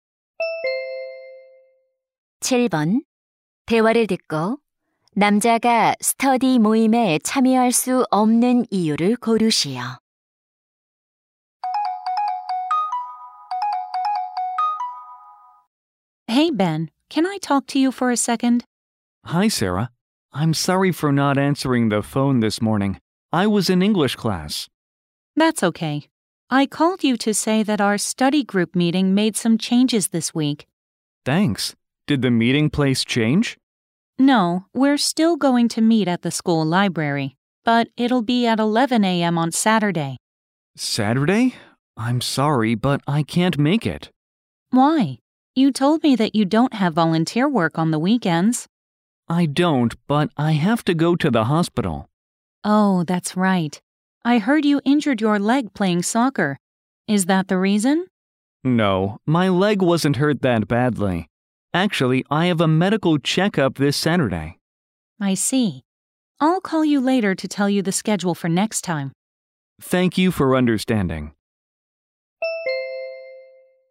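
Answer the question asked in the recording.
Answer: 건강 검진을 받아야 해서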